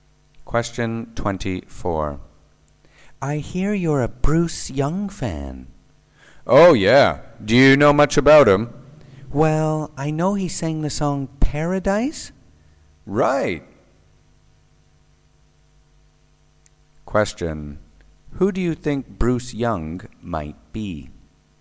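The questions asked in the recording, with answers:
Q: Who do you think Bruce Young might be?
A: A singer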